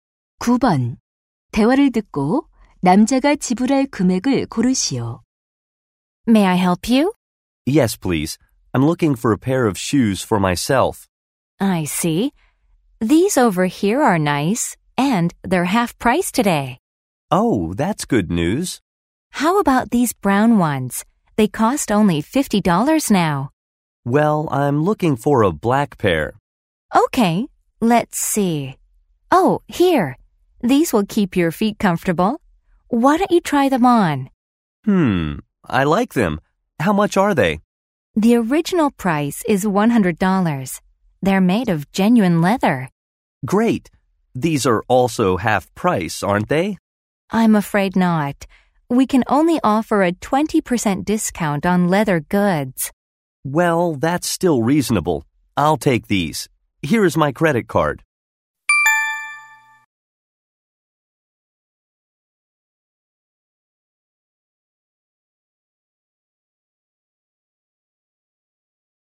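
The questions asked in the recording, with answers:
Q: 대화를 듣고 남자가 지불할 금액을 고르시오.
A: $80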